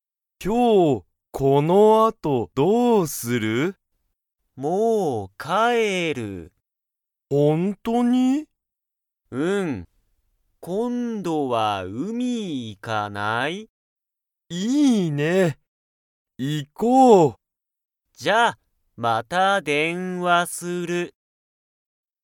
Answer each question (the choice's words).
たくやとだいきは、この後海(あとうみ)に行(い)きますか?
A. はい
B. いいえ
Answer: いいえ

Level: Level 1